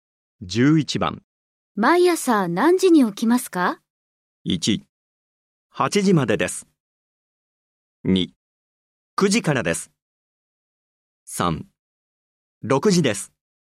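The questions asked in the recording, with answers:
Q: 毎朝何時に起きますか?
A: 3: 6時です。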